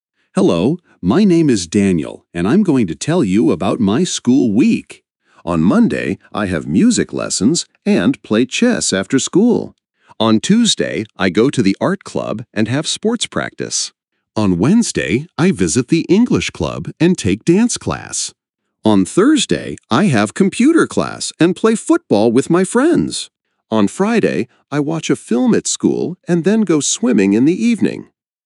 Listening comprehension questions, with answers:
Listen and match the activities with the days of the week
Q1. play chess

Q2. go to the art club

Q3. have computer class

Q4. take dance class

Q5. have music lessons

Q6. watch a film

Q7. visit the English club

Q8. have sports practice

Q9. go swimming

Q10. play football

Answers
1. Monday
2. Tuesday
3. Thursday
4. Wednesday
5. Monday
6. Friday
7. Wednesday
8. Tuesday
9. Friday
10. Thursday

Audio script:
Hello! My name is Daniel, and I'm going to tell you about my school week.
On Monday, I have music lessons and play chess after school.
On Tuesday, I go to the art club and have sports practice.
On Wednesday, I visit the English club and take dance class.
On Thursday, I have computer class and play football with my friends.
On Friday, I watch a film at school and then go swimming in the evening.

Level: 4 класс